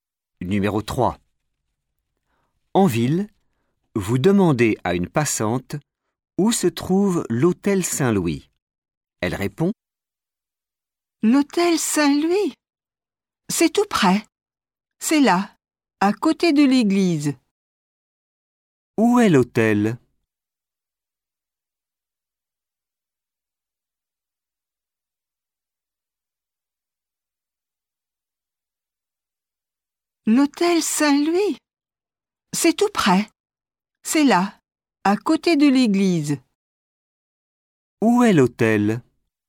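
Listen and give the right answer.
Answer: À côté de l'église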